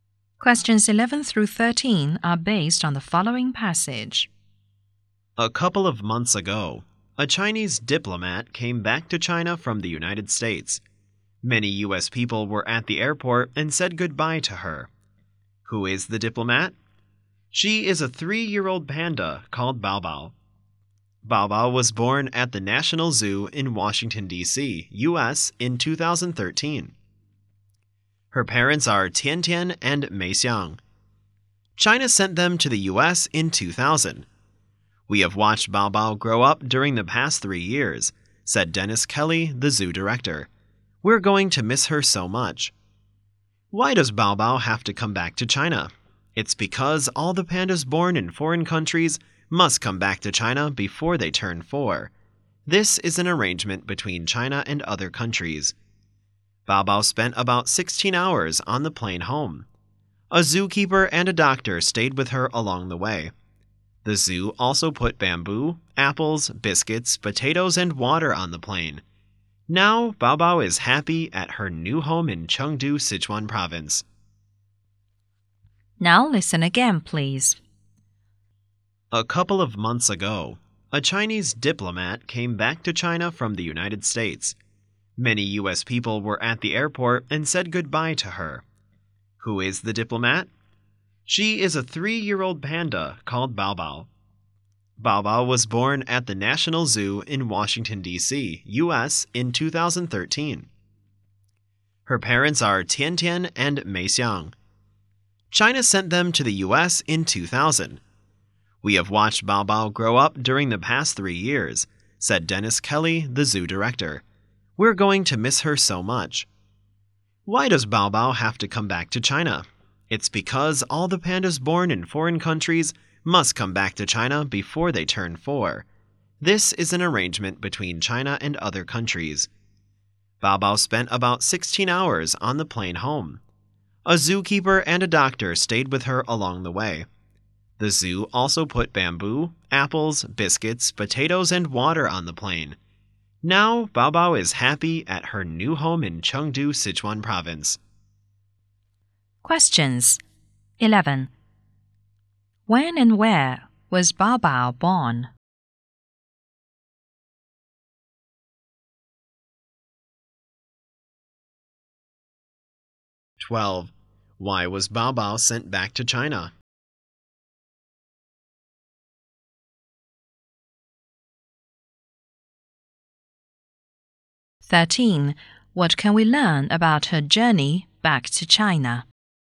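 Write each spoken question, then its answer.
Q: When and where was Bao Bao born?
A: In 2013, at the National Zoo in Washington, D.C.

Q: Why was Bao Bao sent back to China?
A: Pandas born abroad must return to China before they turn 4.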